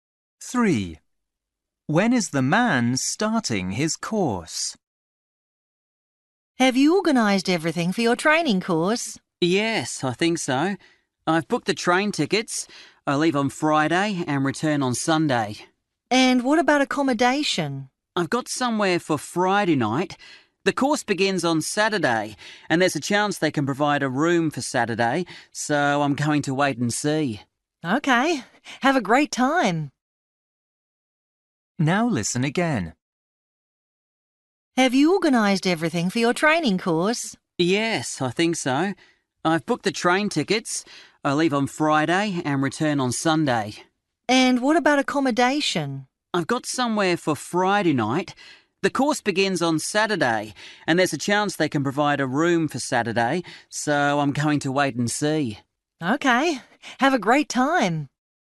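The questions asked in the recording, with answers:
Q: When is the man starting his course?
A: Saturday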